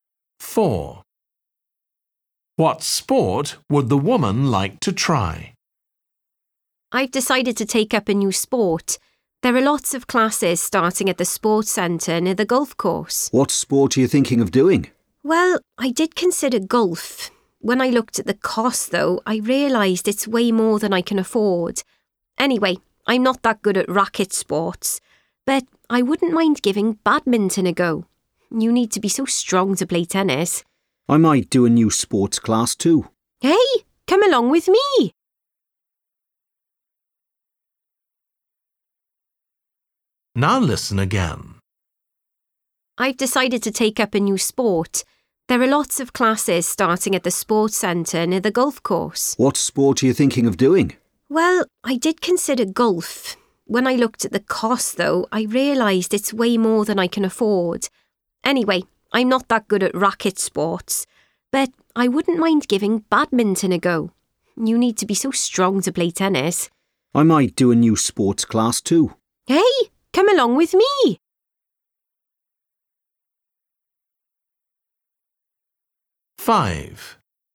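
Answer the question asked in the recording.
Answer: Badminton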